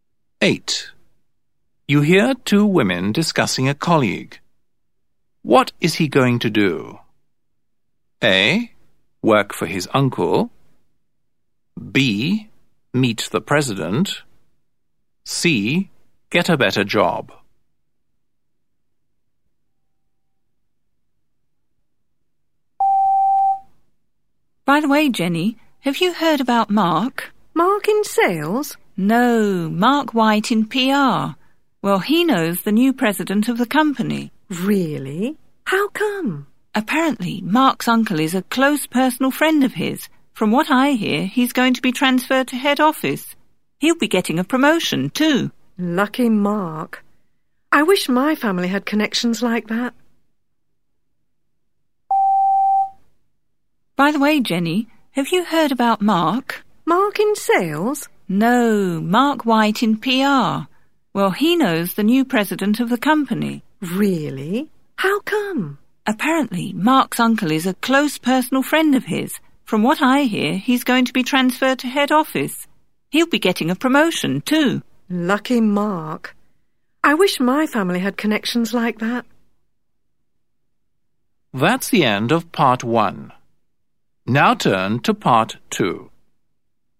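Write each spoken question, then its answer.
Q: What is he going to do?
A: C: Get a better job.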